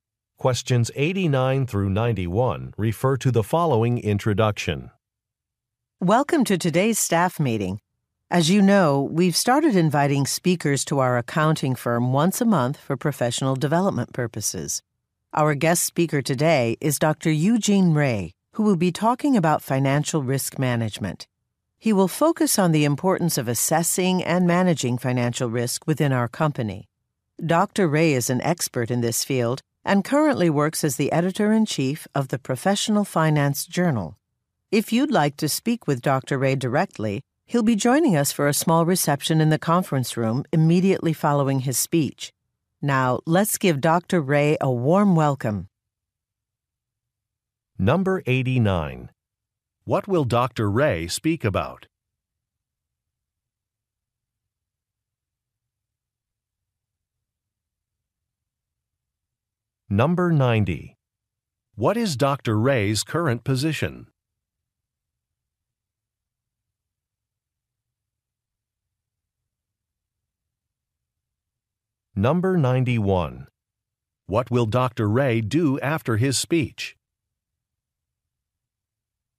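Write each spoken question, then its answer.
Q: What will Dr. Ray speak about?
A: Financial risk management

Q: What is Dr. Ray's current position?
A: Editor-in-chief of a journal

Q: What will Dr. Ray do after his speech?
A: Attend a reception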